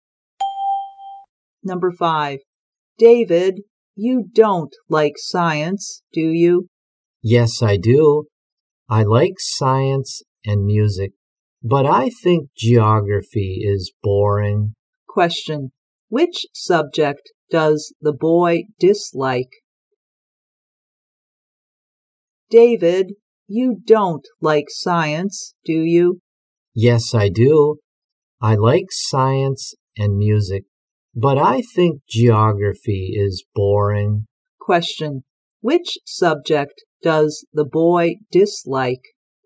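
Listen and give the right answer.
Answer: Geography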